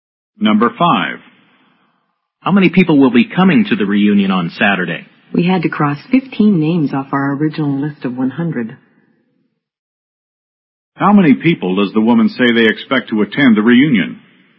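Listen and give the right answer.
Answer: 85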